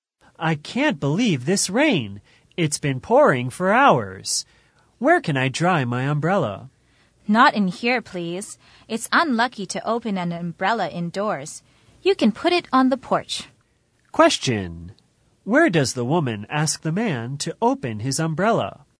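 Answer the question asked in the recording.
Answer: On the porch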